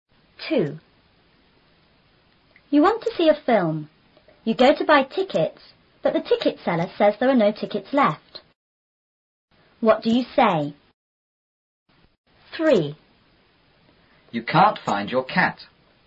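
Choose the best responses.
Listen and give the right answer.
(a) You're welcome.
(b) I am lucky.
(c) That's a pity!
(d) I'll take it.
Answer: (c) That's a pity!

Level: 初中英语广州版4B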